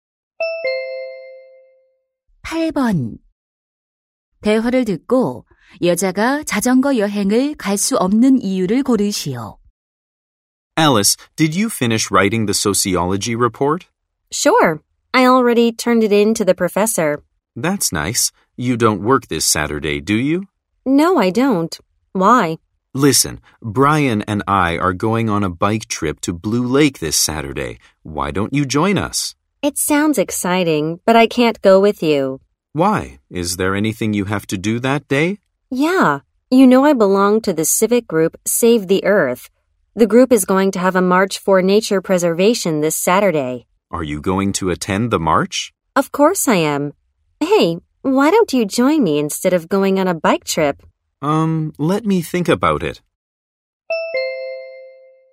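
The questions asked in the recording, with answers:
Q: 대화를 듣고 여자가 자전거 여행을 갈 수 없는 이유를 고르시오.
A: 자연 보호 행진에 참가해야 해서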